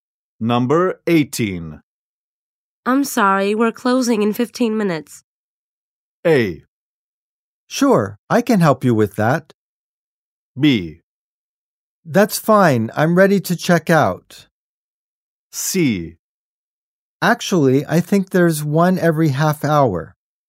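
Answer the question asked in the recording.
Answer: B: That's fine, I'm ready to check out.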